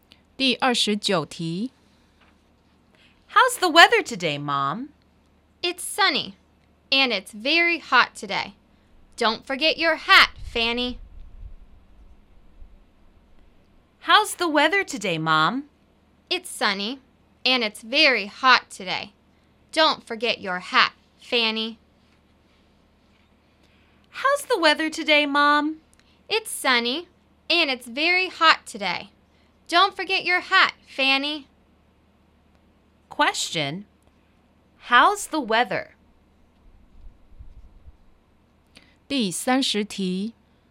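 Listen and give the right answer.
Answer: Sunny and very hot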